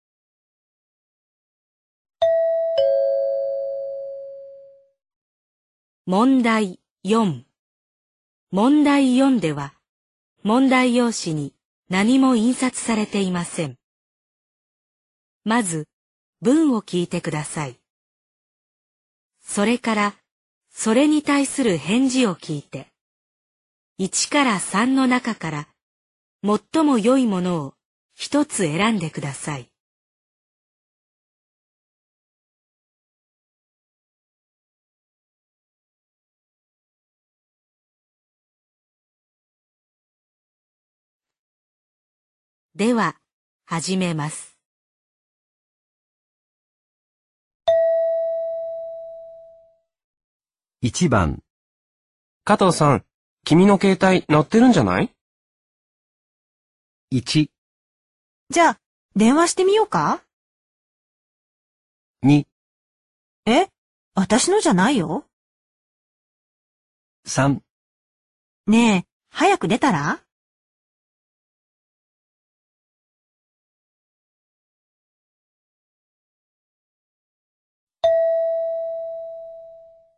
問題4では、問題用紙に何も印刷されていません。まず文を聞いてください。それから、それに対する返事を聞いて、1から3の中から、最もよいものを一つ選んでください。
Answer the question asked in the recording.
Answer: 2

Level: N2